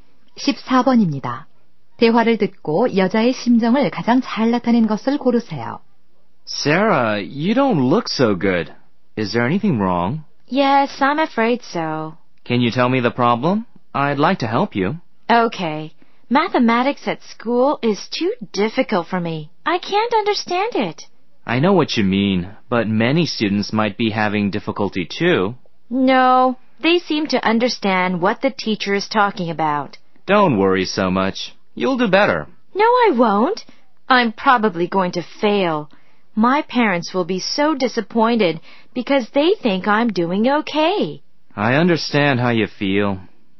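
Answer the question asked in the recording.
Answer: 걱정스러움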